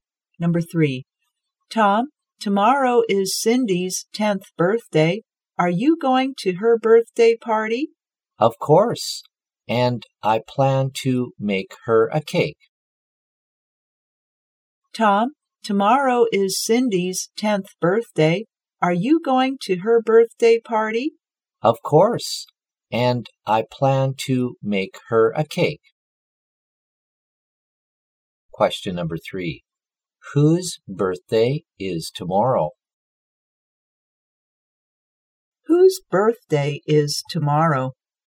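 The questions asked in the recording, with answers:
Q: Whose birthday is tomorrow?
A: Cindy's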